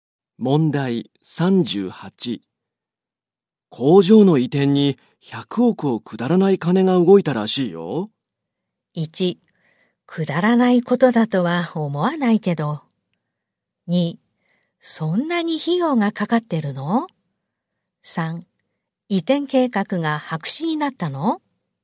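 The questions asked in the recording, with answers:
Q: 工場の移転に100億をくだらない金が動いたらしいよ。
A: 2: そんなに費用がかかってるの?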